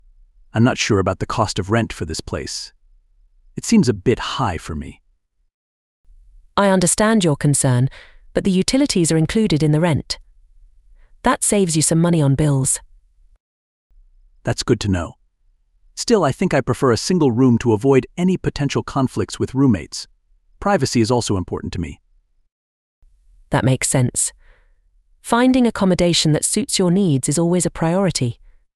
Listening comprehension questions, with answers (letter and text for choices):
You will hear three conversations. There are four questions for each conversation. For each question, choose the correct answer A, B, C, or D.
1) What is the man's main concern about the accommodation?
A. The cost of rent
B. The size of the room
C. The distance to campus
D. The availability of facilities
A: A. The cost of rent

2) What does the woman suggest about the utilities?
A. They are covered by the landlord.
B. They are included in the rent.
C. They are optional for students.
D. They need to be paid separately.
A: B. They are included in the rent.

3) Why does the man prefer a single room?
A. To focus on his studies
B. To save money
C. To have more privacy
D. To avoid conflicts with the neighbors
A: C. To have more privacy

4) What is the topic of the conversation?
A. Choosing a course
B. Finding accommodation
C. Budgeting expenses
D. Joining a student club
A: B. Finding accommodation

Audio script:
• Man: "I'm not sure about the cost of rent for this place. It seems a bit high for me."
• Woman: "I understand your concern, but the utilities are included in the rent. That saves you some money on bills."
• Man: "That's good to know. Still, I think I prefer a single room to avoid any potential conflicts with roommates. Privacy is also important to me."
• Woman: "That makes sense. Finding accommodation that suits your needs is always a priority."

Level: VSTEP B1